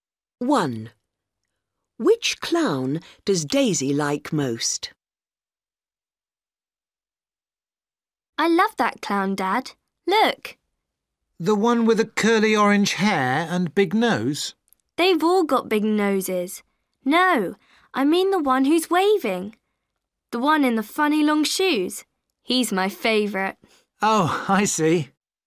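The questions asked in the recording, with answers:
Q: Which clown does Daisy like most?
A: The one who's waving, in the funny long shoes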